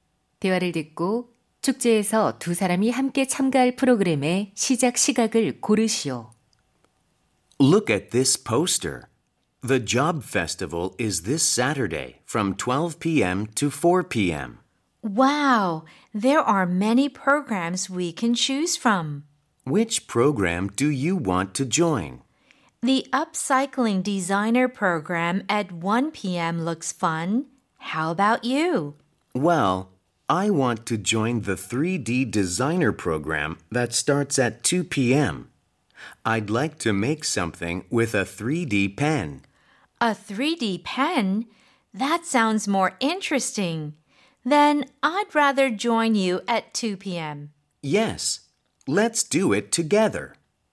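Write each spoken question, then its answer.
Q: 대화를 듣고 축제에서 두 사람이 함께 참가할 프로그램의 시작 시각을 고르시오.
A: 오후 2시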